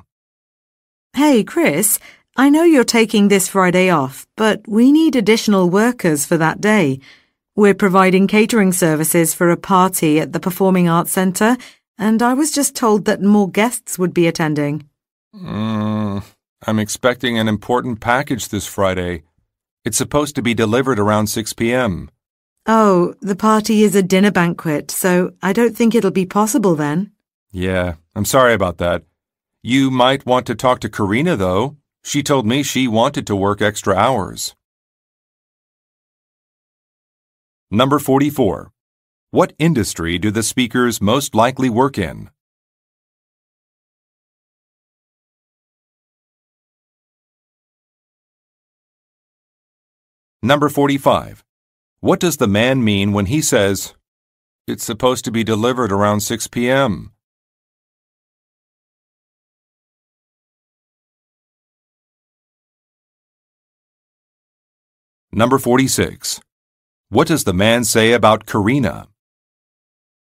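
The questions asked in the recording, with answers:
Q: What industry do the speakers most likely work in?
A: Catering (food service)

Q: What does the man say about Karina?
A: She wants to work extra hours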